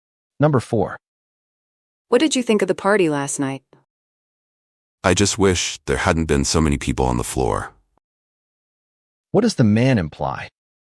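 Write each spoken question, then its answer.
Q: What does the man imply?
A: The party was too crowded.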